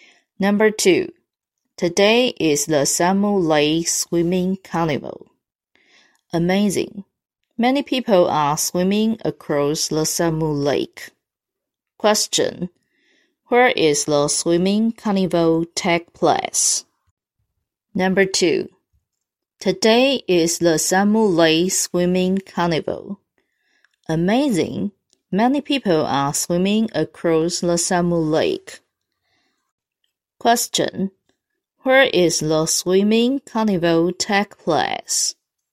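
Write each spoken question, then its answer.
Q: Where is the swimming carnival take place?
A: At Samu Lake.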